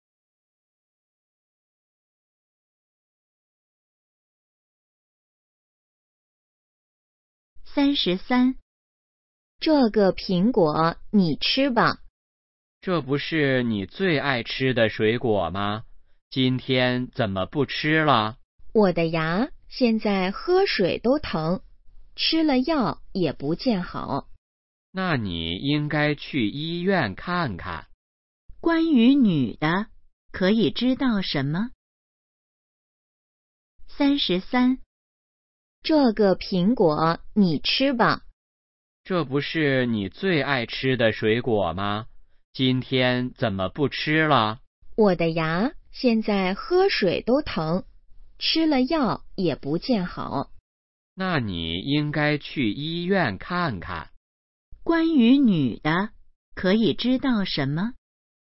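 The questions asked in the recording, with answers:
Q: 关于女的,可以知道什么?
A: 她牙疼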